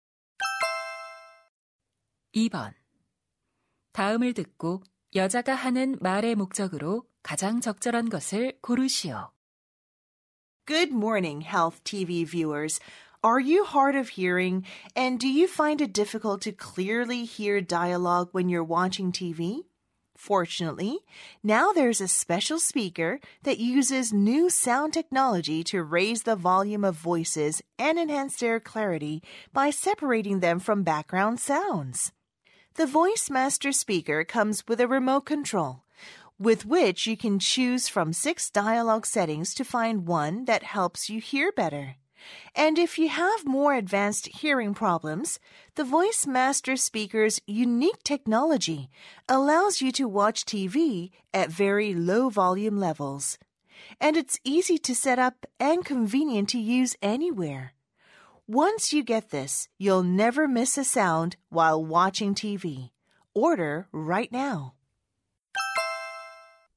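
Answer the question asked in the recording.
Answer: TV용 음성 강화 스피커(Voice Master) 광고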